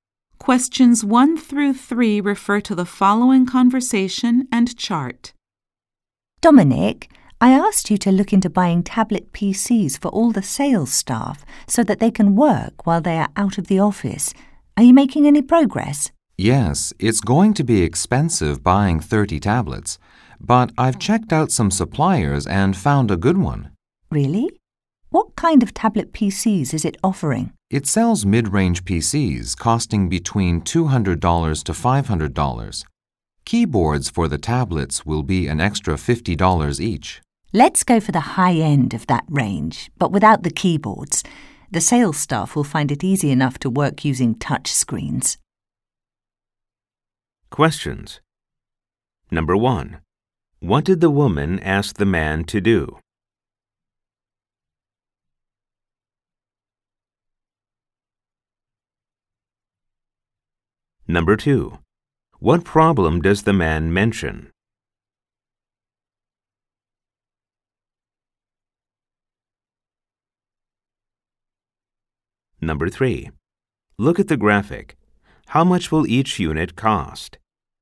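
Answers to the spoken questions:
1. Look into buying tablet PCs for the sales staff
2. Buying 30 tablets will be expensive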